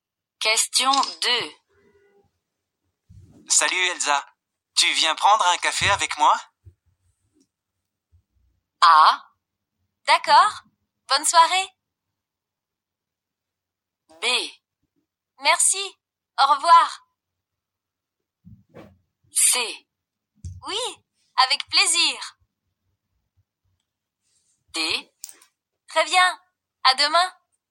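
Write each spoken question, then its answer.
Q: Salut Elsa, tu viens prendre un café avec moi?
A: C: Oui, avec plaisir.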